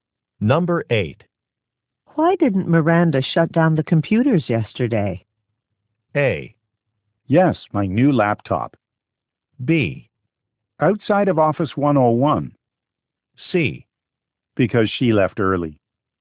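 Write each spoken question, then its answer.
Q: Why didn't Miranda shut down the computers yesterday?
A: C: Because she left early.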